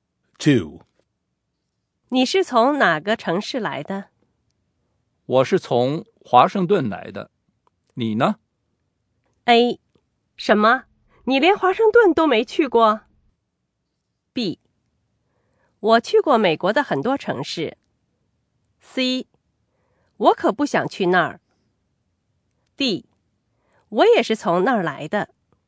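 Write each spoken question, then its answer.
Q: 我是从华盛顿来的。你呢?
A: D: 我也是从那儿来的。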